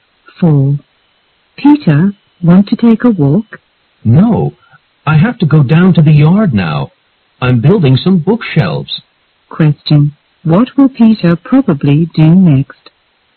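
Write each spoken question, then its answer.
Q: What will Peter probably do next?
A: Build some bookshelves in the yard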